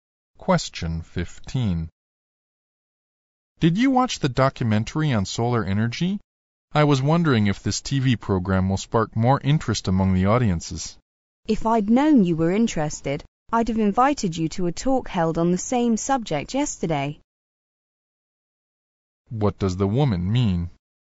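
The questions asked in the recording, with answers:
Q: What does the woman mean?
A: She would have invited him to yesterday's talk on solar energy if she had known he was interested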